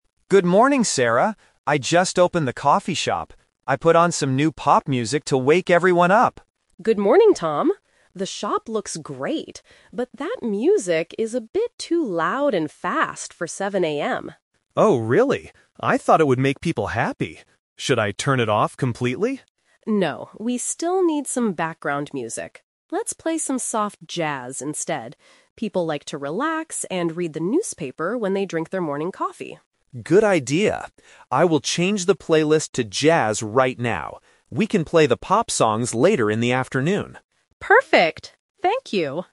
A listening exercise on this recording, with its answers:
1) What kind of music did Tom play when he opened the shop?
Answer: Fast pop music.

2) Why does the manager want to change the music?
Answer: Because it is too loud for the early morning.

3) When will they listen to the pop songs?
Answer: Later in the afternoon.

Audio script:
Man: Good morning, Sarah! I just opened the coffee shop. I put on some new pop music to wake everyone up.
Woman: Good morning, Tom. The shop looks great, but that music is a bit too loud and fast for 7 AM.
Man: Oh, really? I thought it would make people happy. Should I turn it off completely?
Woman: No, we still need some background music. Let's play some soft jazz instead. People like to relax and read the newspaper when they drink their morning coffee.
Man: Good idea. I will change the playlist to jazz right now.